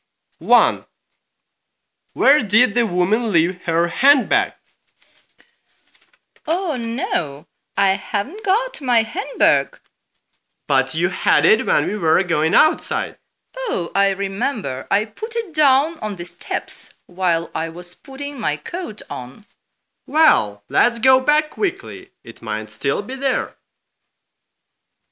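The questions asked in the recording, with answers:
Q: Where did the woman leave her handbag?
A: On the steps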